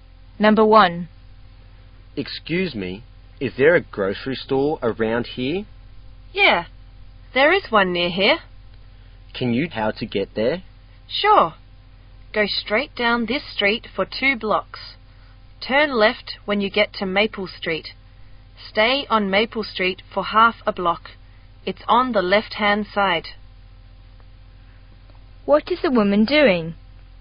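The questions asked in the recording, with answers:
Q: What is the woman doing?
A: Giving directions to a grocery store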